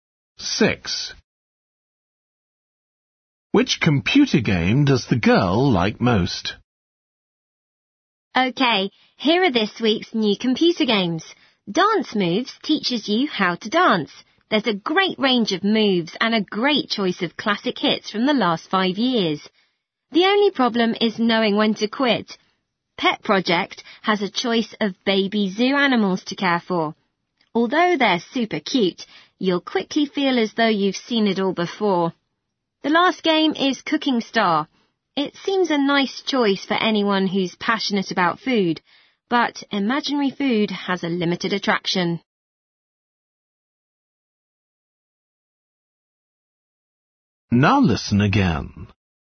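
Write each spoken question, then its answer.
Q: Which computer game does the girl like most?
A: Dance Moves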